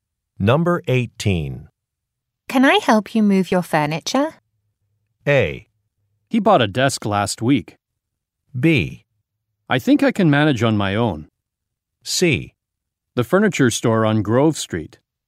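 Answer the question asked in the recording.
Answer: B: I think I can manage on my own.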